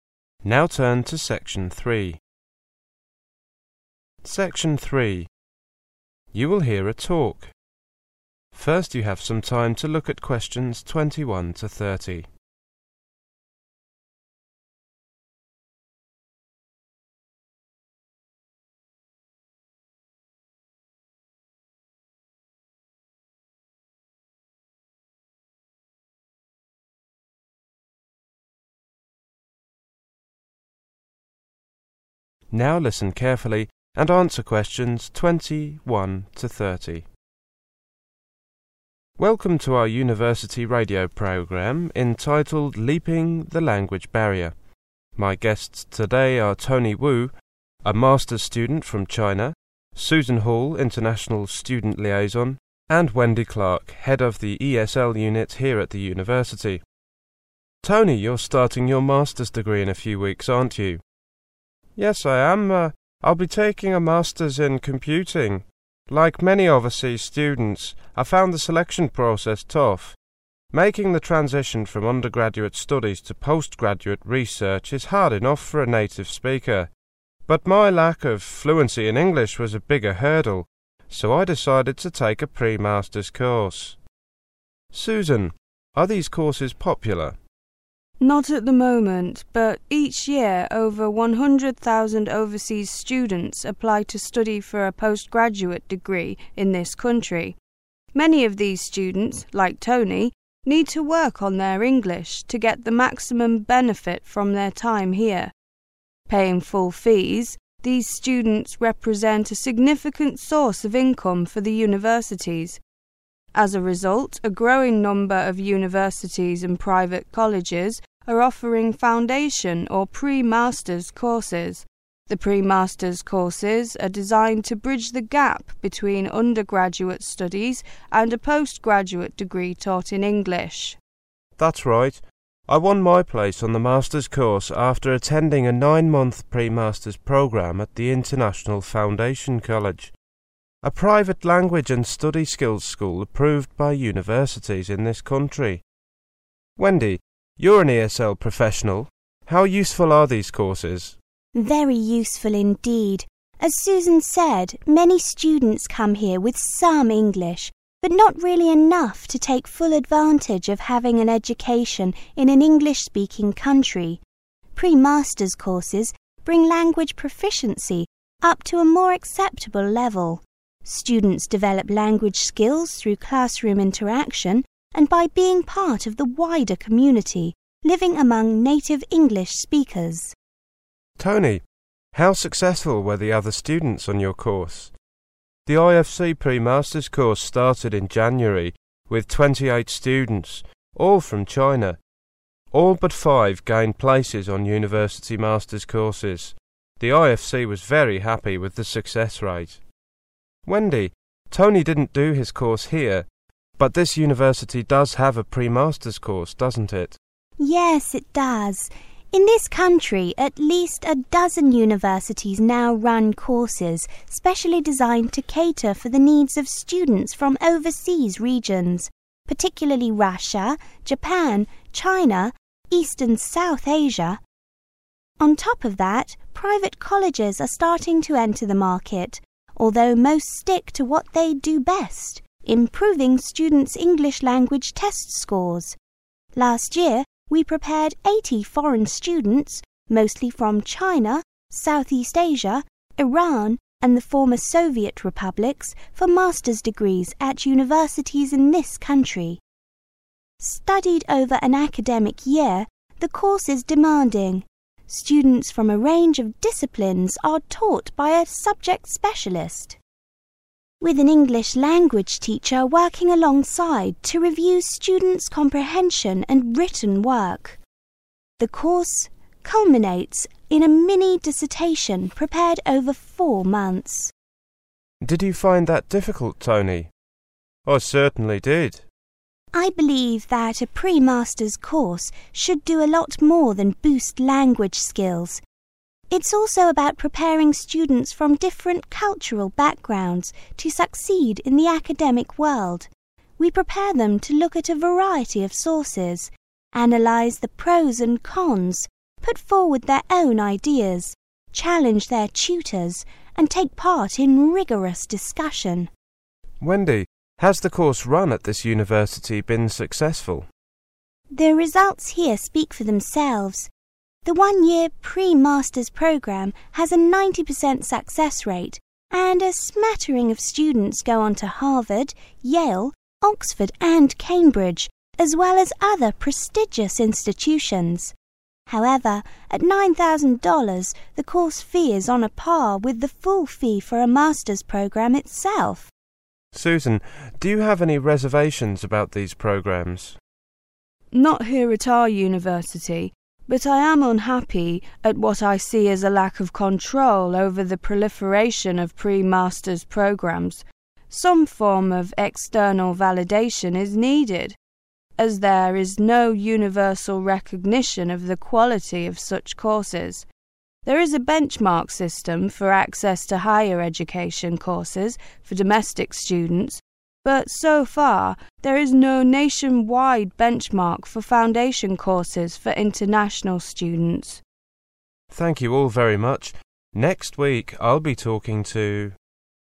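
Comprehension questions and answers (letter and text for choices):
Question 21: Which three guests are on the radio programme? Write the correct letter on your answer sheet.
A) Tony Wu, an undergraduate student from China, Susan Hall, International Student, and Wendy Clark, Head of the University.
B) Tony Wu, a Master's student from China, Susan Hall, International Student, and Wendy Clark, Head of the ESL Unit.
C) Tony Wu, a Master's student from China, Susan Hall, International Student Liaison, and Wendy Clark, Head of English.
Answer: B) Tony Wu, a Master's student from China, Susan Hall, International Student, and Wendy Clark, Head of the ESL Unit.

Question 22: Tony Wu took a pre-Master's course because of his ___________ in English.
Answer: lack of fluency

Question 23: Susan says international students are a ___________ of funds for universities.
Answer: significant source

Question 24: Wendy says living among native speakers helps students ___________.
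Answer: develop language skills

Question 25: How many students on Tony's course passed?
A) All of them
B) 28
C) 23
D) 5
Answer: C) 23

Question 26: How many universities in the country have special courses for international students?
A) All of them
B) More than 12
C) 12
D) Less than 12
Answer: B) More than 12

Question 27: What do private colleges focus on, according to Wendy?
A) Pre-Master's courses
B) Exam-related courses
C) General English courses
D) Technological terminology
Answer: B) Exam-related courses

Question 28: Wendy says a pre-Master's course should encourage students to ___________ their teachers.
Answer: challenge

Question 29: Wendy says a pre-Master's course costs the same as a ___________Master's programme.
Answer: full fee

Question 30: Susan thinks a ___________ for such courses would be good.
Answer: nationwide benchmark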